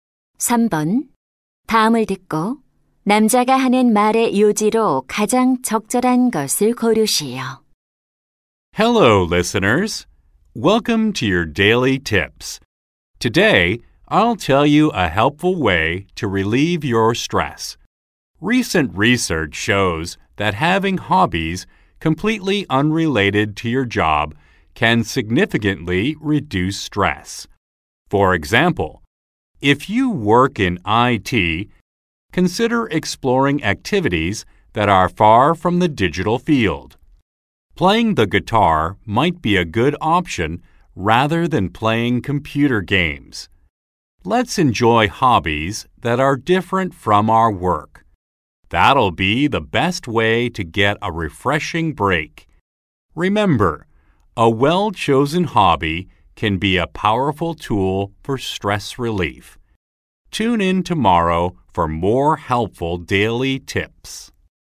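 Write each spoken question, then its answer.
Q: 다음을 듣고 남자가 하는 말의 요지로 가장 적절한 것을 고르시오.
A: 업무와 무관한 취미는 스트레스 해소에 도움이 된다.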